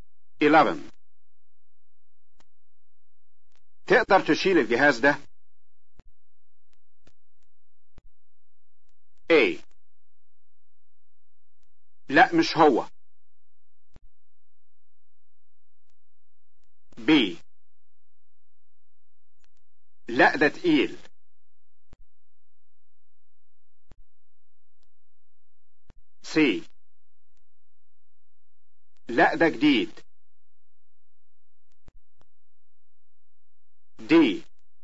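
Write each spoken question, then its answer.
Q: تقدر تشيل الجهاز ده؟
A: B: لا ده تقيل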